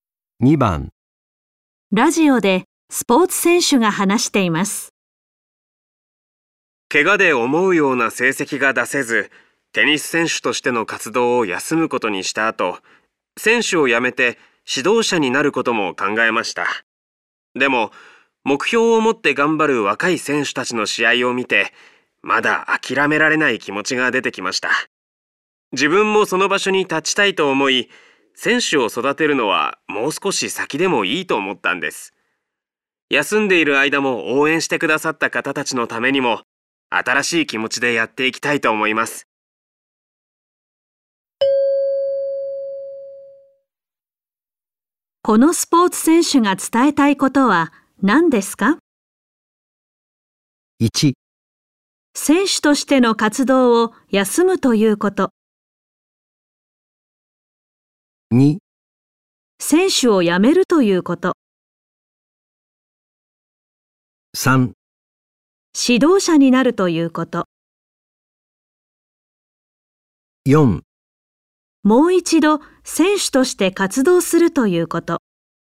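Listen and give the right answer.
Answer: 4: もう一度選手として活動するということ。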